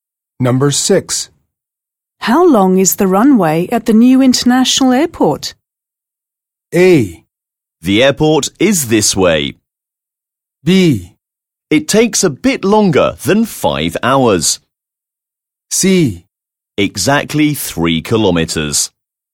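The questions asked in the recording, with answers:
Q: How long is the runway at the new international airport?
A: C: Exactly 3 kilometers.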